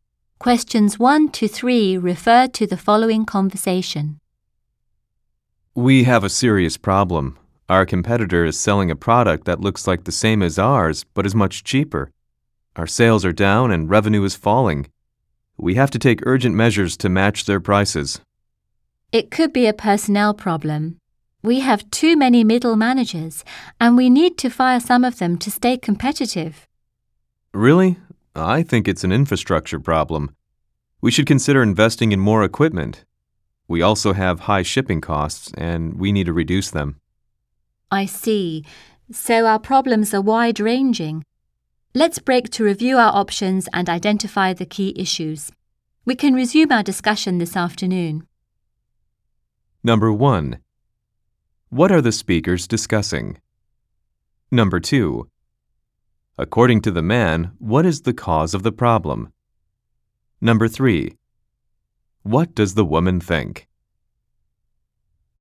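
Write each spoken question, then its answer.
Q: What are the speakers discussing?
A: Falling sales caused by a competitor's cheaper, similar product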